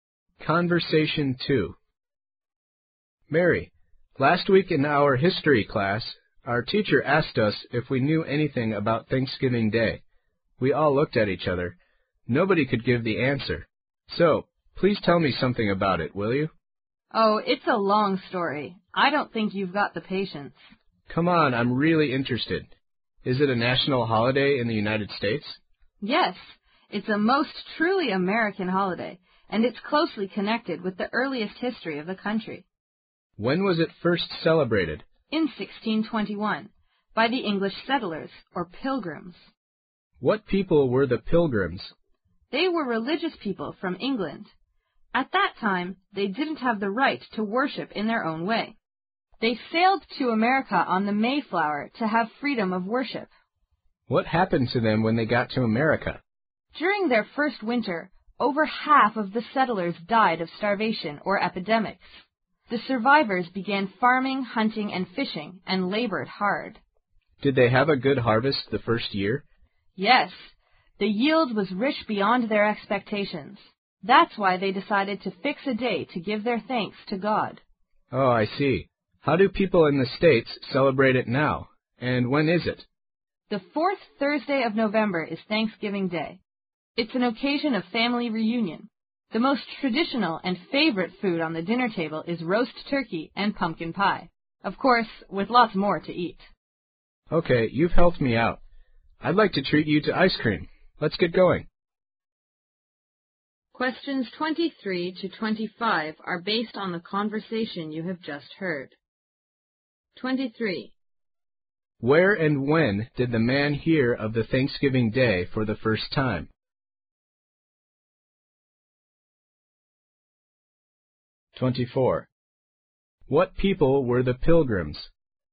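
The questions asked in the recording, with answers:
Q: Where and when did the man hear of the Thanksgiving Day for the first time?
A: In his history class last week

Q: What people were the pilgrims?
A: Religious people from England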